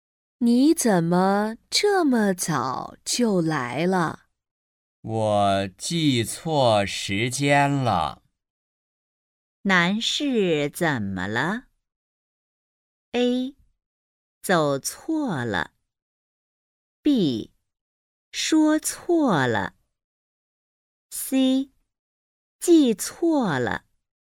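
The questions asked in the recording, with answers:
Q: 男士怎么了?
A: C: 记错了。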